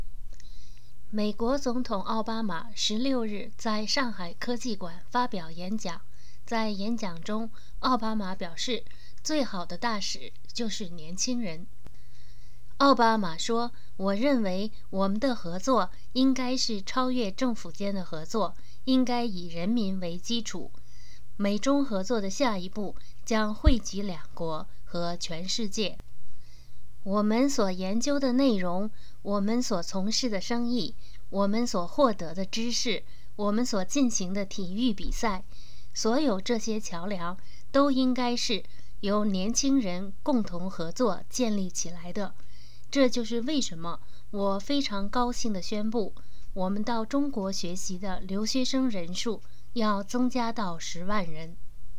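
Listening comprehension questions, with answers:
Please answer the following questions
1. 美国总统奥巴马16日在哪儿发表了演讲?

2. 奥巴马说什么人是最好的大使?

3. 奥巴马怎么看美中合作?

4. 奥巴马宣布到中国的留学生将增加到多少人?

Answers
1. 上海科技馆
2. 年轻人
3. 应该超越政府间的合作,以人民为基础;下一步将惠及两国和全世界
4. 10万人

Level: M.Phil Year 2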